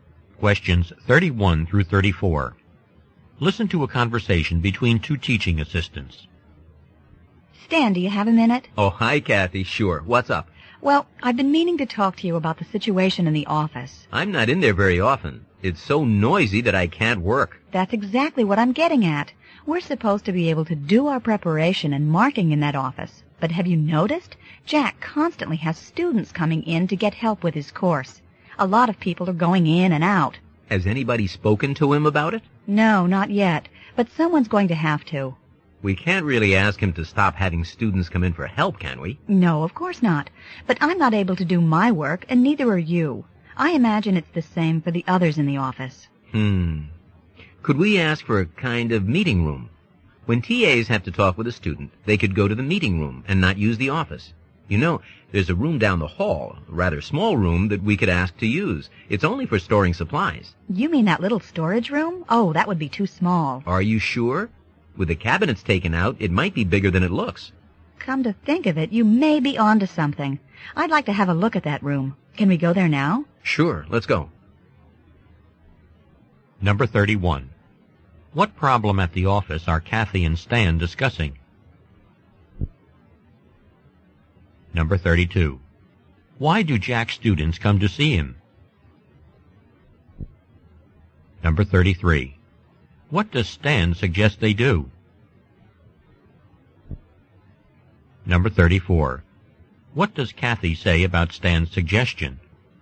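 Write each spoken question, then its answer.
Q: What problem at the office are Kathy and Stan discussing?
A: It is too noisy to work because of Jack's students

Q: Why do Jack's students come to see him?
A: To get help with his course

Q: What does Stan suggest they do?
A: Ask to use the small storage room down the hall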